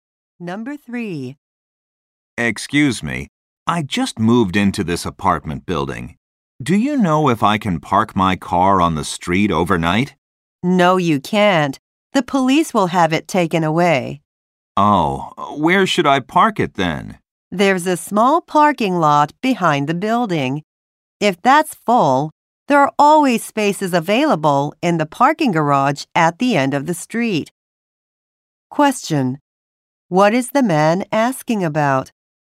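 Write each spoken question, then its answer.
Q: What is the man asking about?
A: Where he can park his car overnight.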